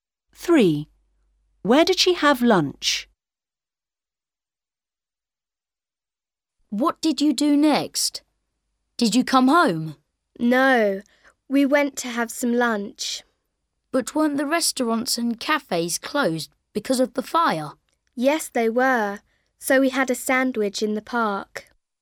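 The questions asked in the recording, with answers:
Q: Where did she have lunch?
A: in the park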